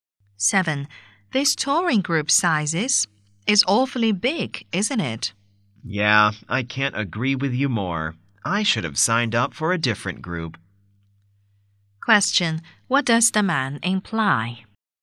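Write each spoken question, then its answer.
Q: What does the man imply?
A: He regrets joining this large group.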